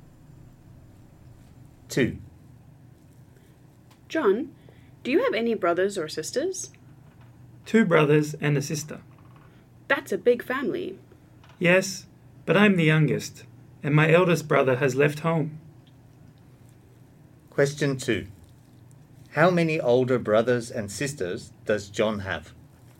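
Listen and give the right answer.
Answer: Three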